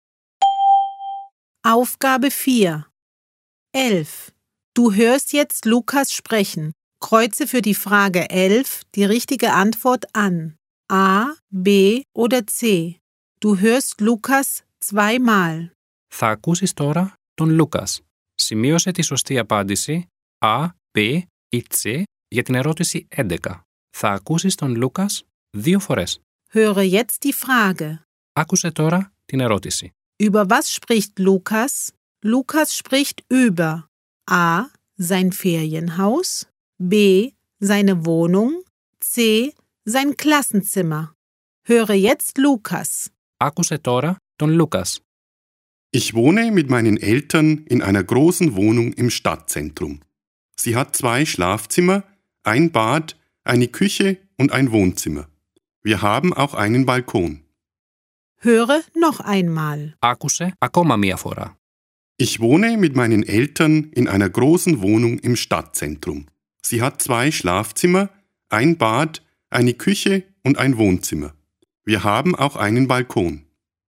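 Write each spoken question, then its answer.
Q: Über was spricht Lukas?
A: B: Seine Wohnung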